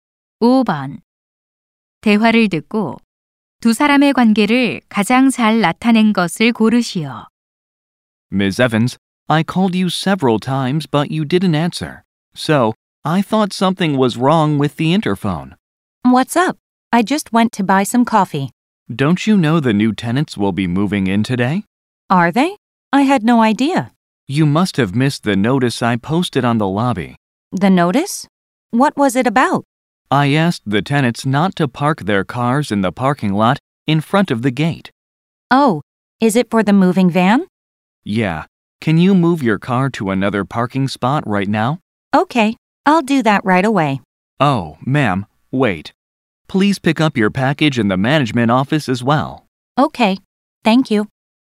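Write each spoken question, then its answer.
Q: 대화를 듣고 두 사람의 관계를 가장 잘 나타낸 것을 고르시오.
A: 건물 관리인 - 입주자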